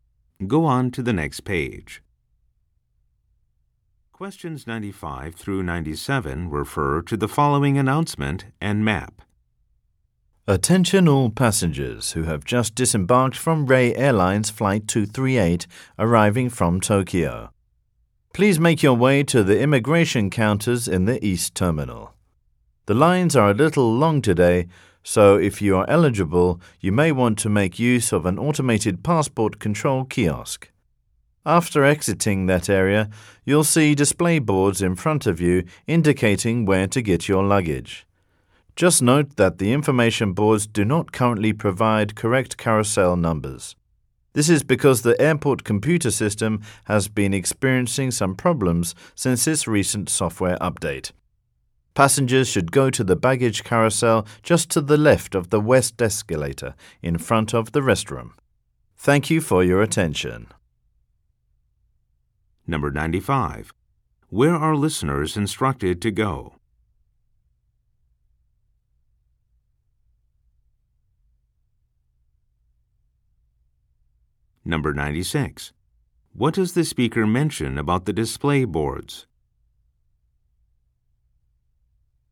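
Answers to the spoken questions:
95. The immigration counters in the East Terminal
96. They show wrong carousel numbers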